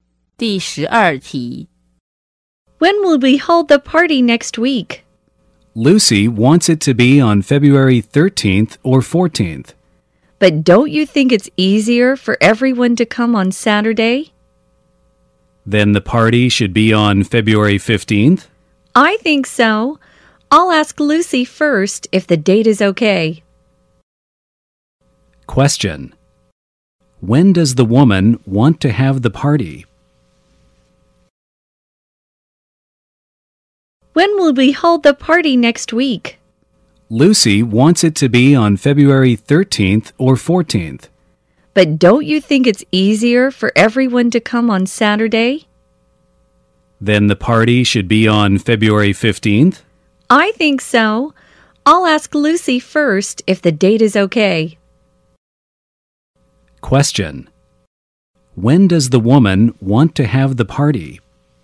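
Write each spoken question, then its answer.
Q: When does the woman want to have the party?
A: On Saturday, February 15th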